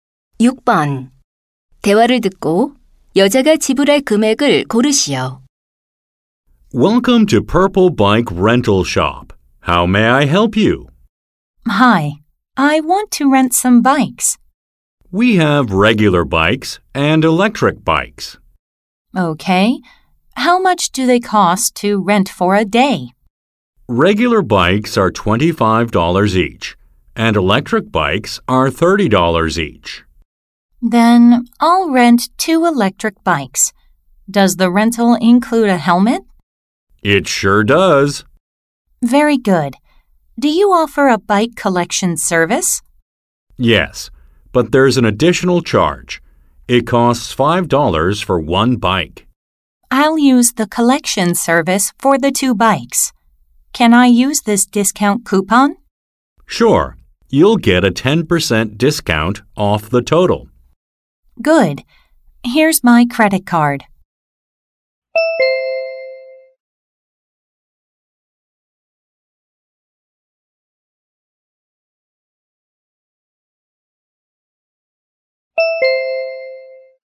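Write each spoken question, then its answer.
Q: 대화를 듣고 여자가 지불할 금액을 고르시오.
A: $63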